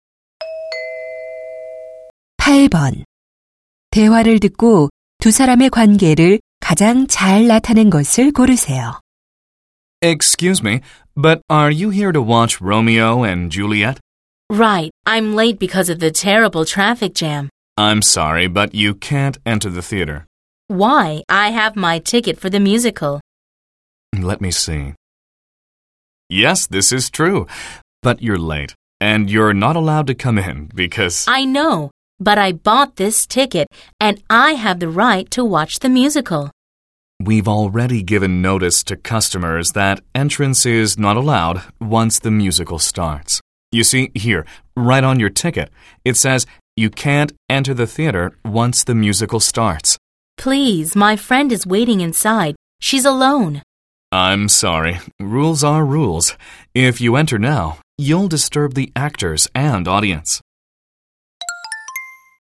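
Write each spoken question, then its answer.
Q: 대화를 듣고 두 사람의 관계를 가장 잘 나타낸 것을 고르세요.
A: 극장 직원과 관객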